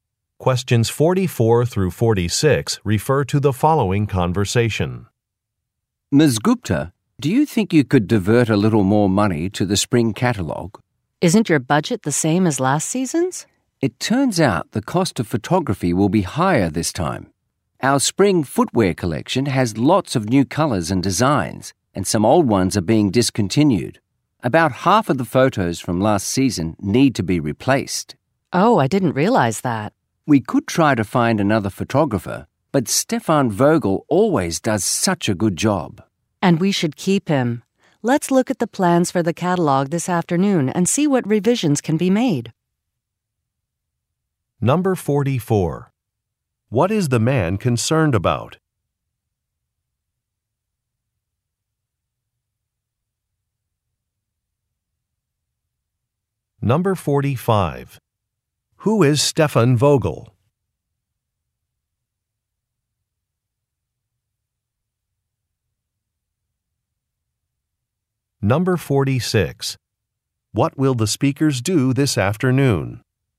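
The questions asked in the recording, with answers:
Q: What is the man concerned about?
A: Higher photography costs for the catalog

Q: Who is Stefan Vogel?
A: A photographer

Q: What will the speakers do this afternoon?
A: Review the catalog plans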